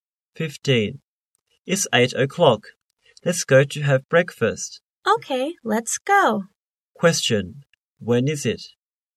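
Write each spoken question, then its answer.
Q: Question, when is it?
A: It's 8:00.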